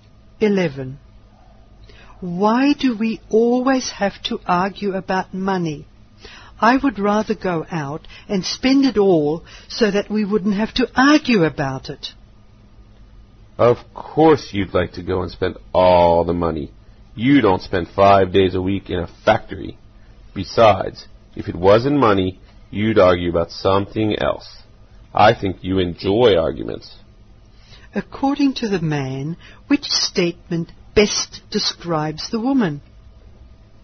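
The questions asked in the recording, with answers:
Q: According to the man, which statement best describes the woman?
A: She enjoys arguments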